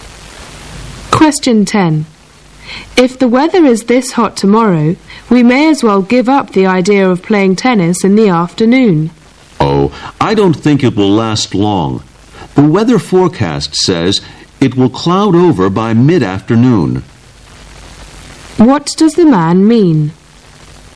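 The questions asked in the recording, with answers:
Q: What does the man mean?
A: The hot weather won't last, so they may still be able to play tennis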